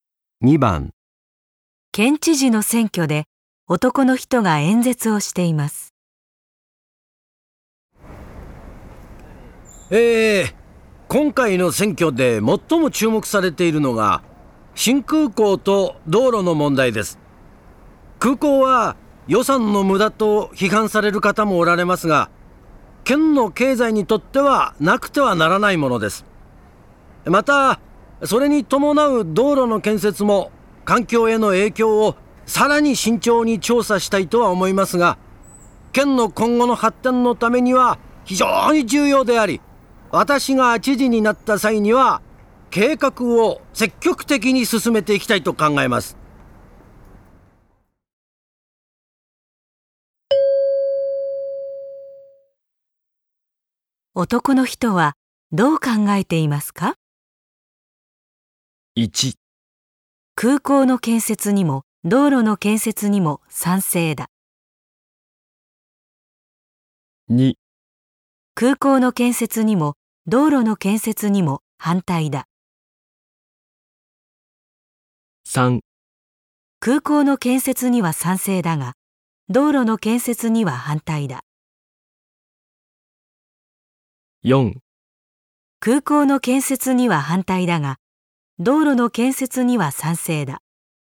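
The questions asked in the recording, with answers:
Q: 男の人はどう考えていますか?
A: 1: 空港の建設にも道路の建設にも賛成だ。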